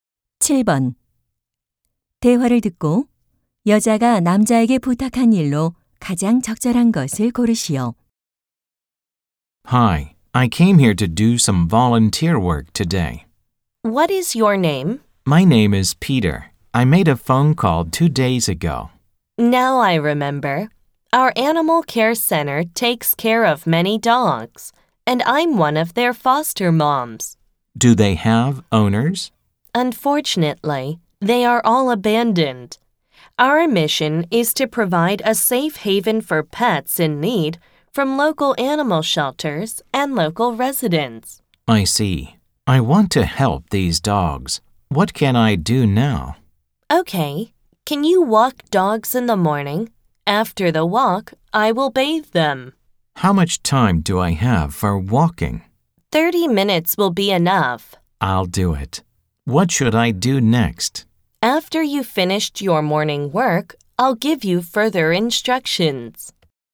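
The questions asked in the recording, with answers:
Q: 대화를 듣고 여자가 남자에게 부탁한 일로 가장 적절한 것을 고르시오.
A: 아침에 개 산책시키기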